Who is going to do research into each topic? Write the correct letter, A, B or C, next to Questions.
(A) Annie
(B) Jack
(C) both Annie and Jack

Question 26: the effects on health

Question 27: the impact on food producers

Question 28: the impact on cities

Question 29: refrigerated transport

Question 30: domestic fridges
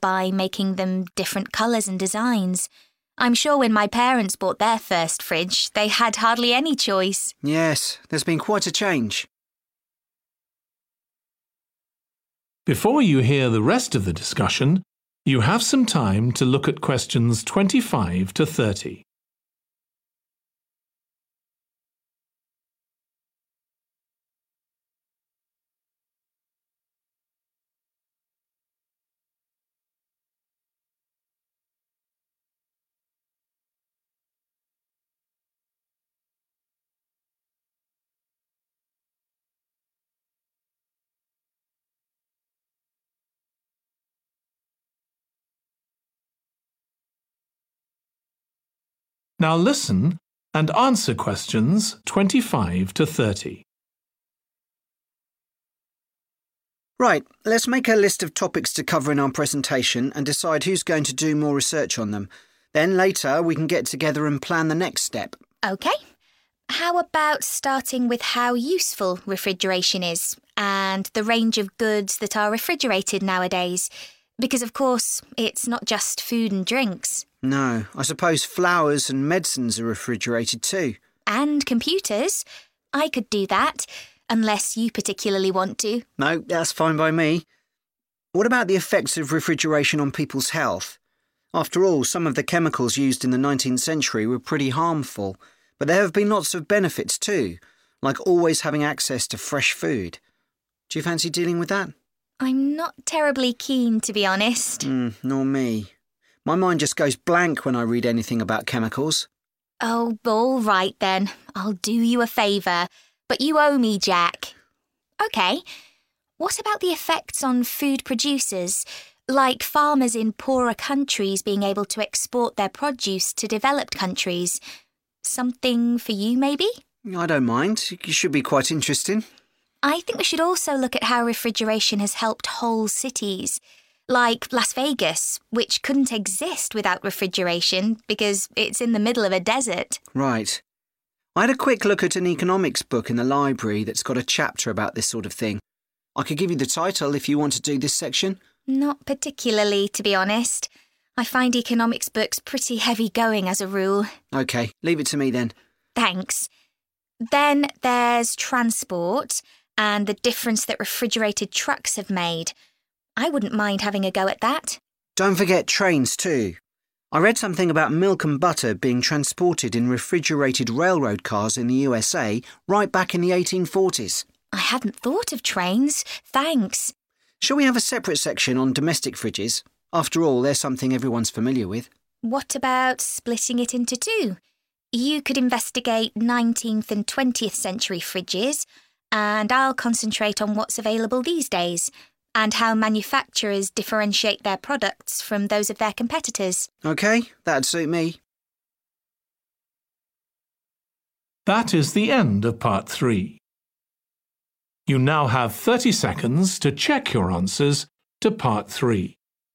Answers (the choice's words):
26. Annie
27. Jack
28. Jack
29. Annie
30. both Annie and Jack

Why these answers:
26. The correct answer is A because the question asks specifically about the effects on health, and Annie is the one who is assigned to research this topic according to the answer key provided.
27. The correct answer is 'B' because in the excerpt, the speaker, Jack, is the one agreeing to 'do a favour,' implying he will be the one conducting research on the specified topic.
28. The correct answer is B because in the excerpt, the focus is on how refrigeration has had an impact on cities, which suggests that Jack should be the one to research this topic specifically.
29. The correct answer is 'A' because the speaker in the excerpt expressed interest in having a go at learning more about refrigerated transport. Since Annie is mentioned and shows interest in this topic, she is the one who will be researching it.
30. The correct answer is C because the excerpt suggests considering a separate section for domestic fridges, which implies that both Annie and Jack will be involved in researching this topic.

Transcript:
ANNIE: That sounds a lot, especially because fridges hardly ever break down.
JACK: That's right. In this country we keep domestic fridges for 11 years on average, and a lot last for 20 or more. So if you divide the cost by the number of years you can use a fridge, they're not expensive, compared with some household appliances.
ANNIE: True. I suppose manufactures encourage people to spend more by making them different colours and designs. I'm sure when my parents bought their first fridge they had hardly any choice!
JACK: Yes, there's been quite a change.
JACK: Right, let's make a list of topics to cover in our presentation, and decide who's going to do more research on them. Then later, we can get together and plan the next step.
ANNIE: OK. How about starting with how useful refrigeration is, and the range of goods that are refrigerated nowadays? Because of course it's not just food and drinks.
JACK: No, I suppose flowers and medicines are refrigerated, too.
ANNIE: And computers. I could do that, unless you particularly want to.
JACK: No, that's fine by me. What about the effects of refrigeration on people's health? After all, some of the chemicals used in the 19th century were pretty harmful, but there have been lots of benefits too, like always have access to fresh food. Do you fancy dealing with that?
ANNIE: I'm no terribly keen, to be honest.
JACK: Nor me. My mind just goes blank when I read anything about chemicals.
ANNIE: Oh, all right then, I'll do you a favour. But you own me, Jack.
What about the effects on food producers, like farmers in poorer countries being able to export their produce to developed countries? Something for you, maybe?
JACK: I don't mind. It should be quite interesting.
ANNIE: I think we should also look at how refrigeration has helped whole cities – like Las Vegas, which couldn't exist without refrigeration because it's in the middle of a desert.
JACK: Right. I had a quick look at an economics book in the library that's got a chapter about this sort of thing. I could give you the title, if you want to do this section.
ANNIE: Not particularly, to be honest. I find economics books pretty heavy going, as a rule.
JACK: OK, leave it to me, then.
ANNIE: Thanks. Then there's transport, and the difference that refrigerated trucks have made. I wouldn't mind having a go at that.
JACK: Don't forget trains, too. I read something about milk and butter being transported in refrigerated railroad cars in the USA, right back in the 1840s.
ANNIE: I hadn't thought of trains. Thanks.
JACK: Shall we have a separate section on domestic fridges? After all, they're something everyone's familiar with.
ANNIE: What about splitting it into two? You could investigate 19th- and 20th-century fridges, and I'll concentrate on what's available these days, and how manufacturers differentiate their products from those of their competitors.
JACK: OK, that'd suit me.